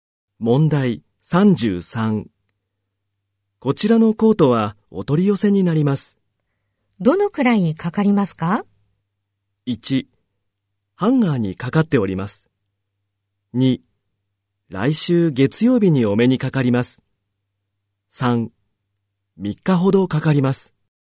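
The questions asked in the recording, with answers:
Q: どのくらいかかりますか?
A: 3: 3日ほどかかります。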